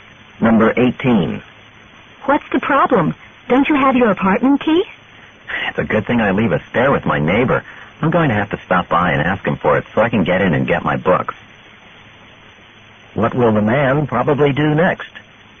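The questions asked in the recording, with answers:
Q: What will the man probably do next?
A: Get his spare key from his neighbor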